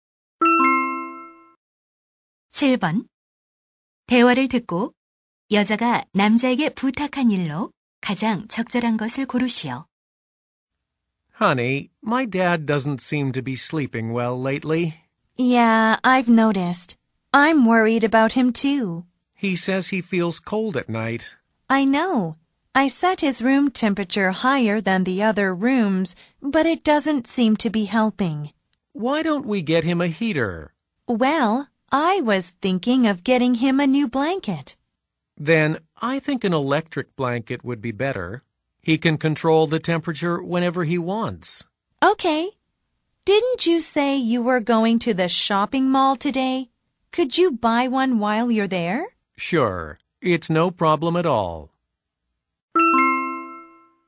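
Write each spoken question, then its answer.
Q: 대화를 듣고 여자가 남자에게 부탁한 일로 가장 적절한 것을 고르시오.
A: 전기담요 사 오기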